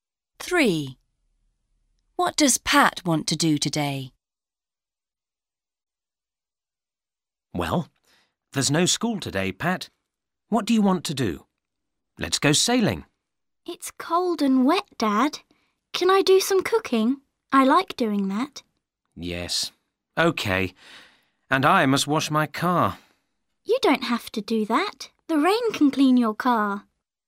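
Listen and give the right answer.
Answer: cooking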